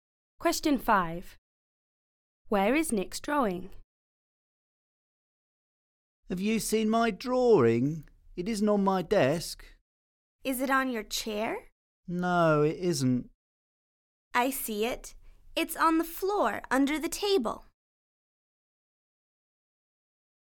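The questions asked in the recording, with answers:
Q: Where is Nick's drawing?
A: on the floor under the table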